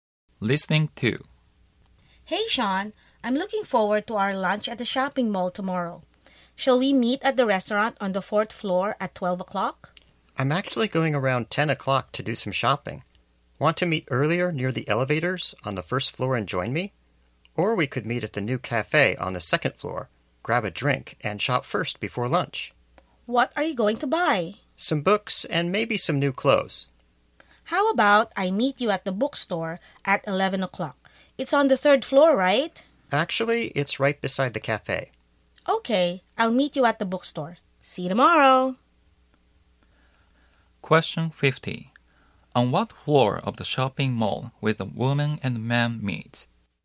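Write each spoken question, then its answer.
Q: On what floor of the shopping mall will the woman and man meet?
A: The second floor (at the bookstore beside the cafe)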